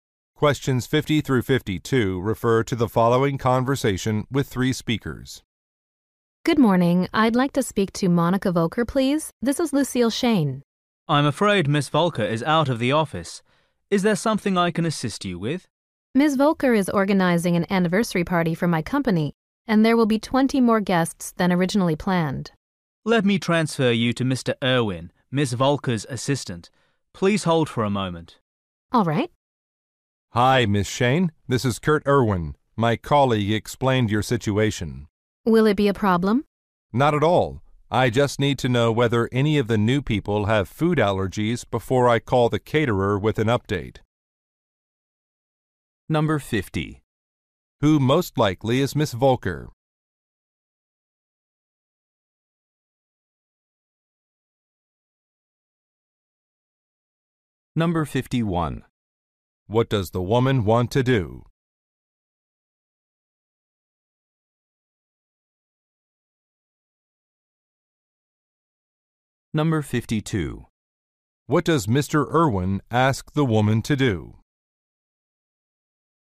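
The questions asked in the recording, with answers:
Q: Who most likely is Miss Volker?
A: An event planner

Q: What does the woman want to do?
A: Increase the number of guests

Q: What does Mr. Irwin ask the woman to do?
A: Tell him whether the new guests have food allergies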